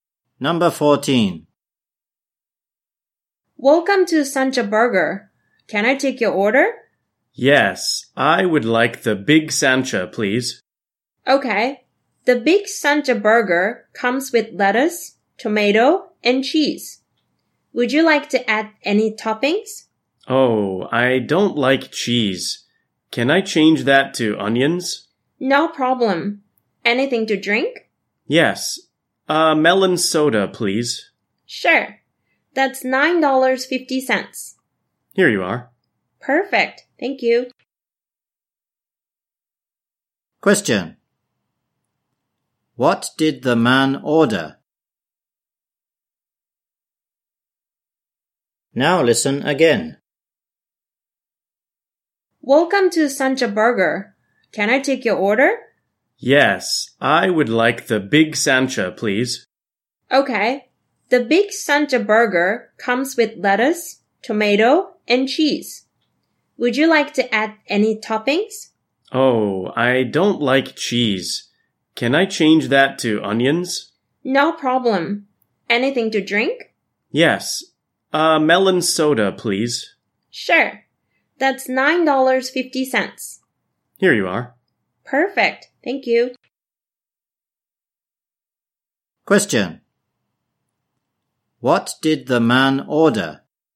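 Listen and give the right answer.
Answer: A Big Sancha burger with onions instead of cheese and a melon soda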